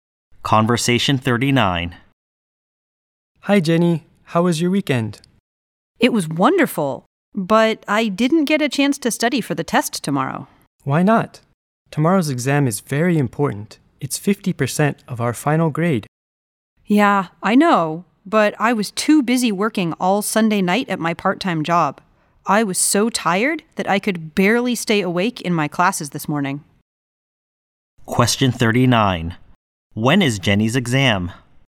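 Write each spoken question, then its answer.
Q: When is Jenny's exam?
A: Tomorrow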